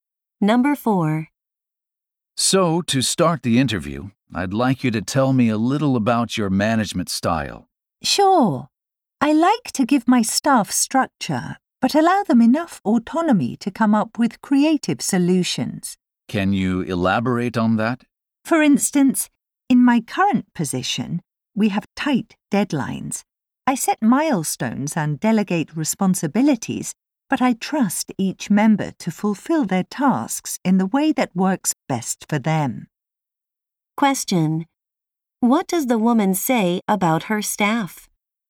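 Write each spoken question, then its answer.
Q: What does the woman say about her staff?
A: She trusts them to do their tasks in their own way.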